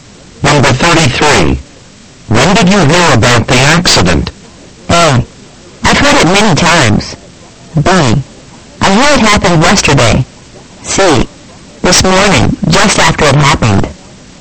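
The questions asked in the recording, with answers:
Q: When did you hear about the accident?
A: C: This morning, just after it happened.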